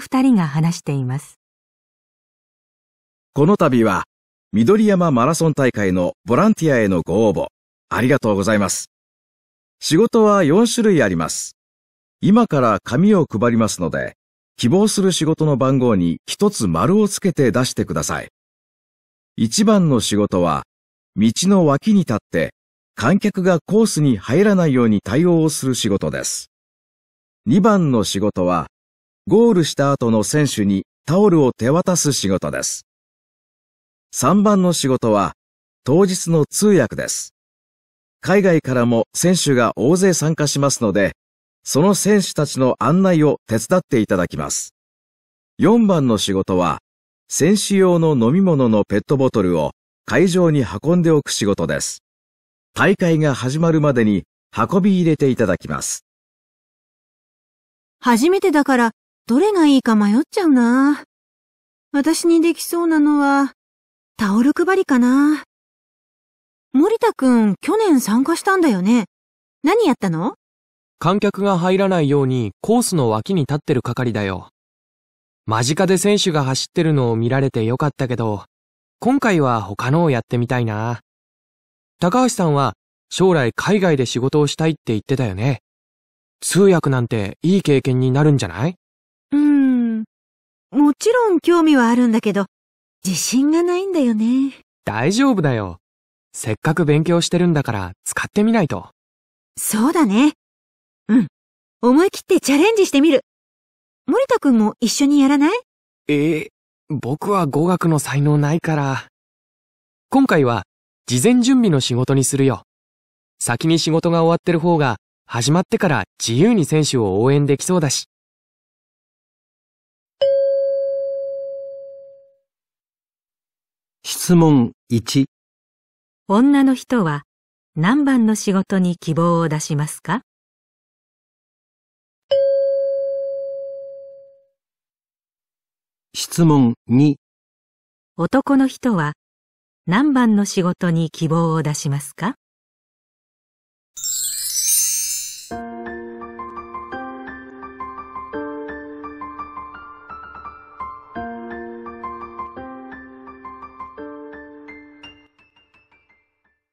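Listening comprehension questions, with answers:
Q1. 男の人は何番の仕事に希望を出しますか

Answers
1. 4番

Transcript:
男1: この度は緑山マラソン大会のボランティアへのご応募ありがとうございます。仕事は4種類あります。今から紙を配りますので希望する仕事の番号に1つ丸をつけて出してください。海外からも選手が大勢参加しますのでその選手たちの案内を手伝っていただきます。大会が始まるまでに運び入れていただきます。
女: 初めてだからどれがいいか迷っちゃうなぁ。私にできそうなのはタオル配りかな?森田くん、去年参加したんだよね?何やったの?
間近で選手が走ってるのを見られてよかったけど、今回は他のをやってみたいなぁ。高橋さんは将来海外で仕事をしたいって言ってたよね?通訳なんていい経験になるんじゃない?
女: うーん、もちろん興味はあるんだけど、自信がないんだよね。
男2: 大丈夫だよ。せっかく勉強してるんだから使ってみないと。
女: そうだね。うん、思い切ってチャレンジしてみる。森田くんも一緒にやらない?
男2: えー、僕は語学の才能ないから...今回は事前準備の仕事にするよ。先に仕事が終わってる方が始まってから自由に選手を応援できそうだし。

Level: N2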